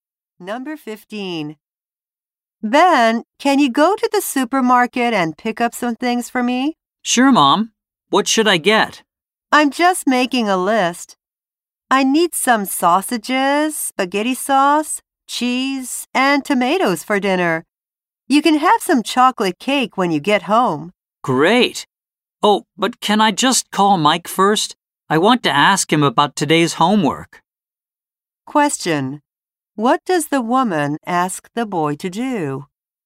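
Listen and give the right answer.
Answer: Go to the supermarket and buy food for dinner.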